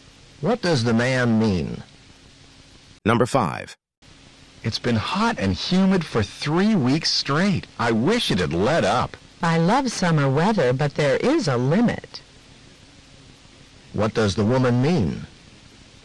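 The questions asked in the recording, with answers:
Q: What does the woman mean?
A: The heat has gone on too long for her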